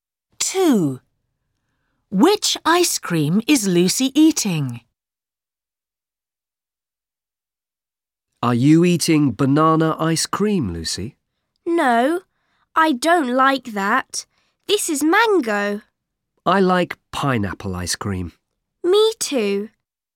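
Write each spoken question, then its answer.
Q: Which ice cream is Lucy eating?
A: mango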